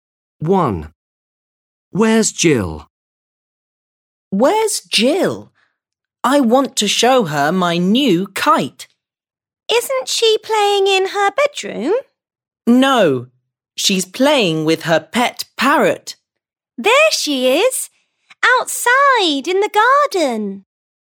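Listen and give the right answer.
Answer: outside in the garden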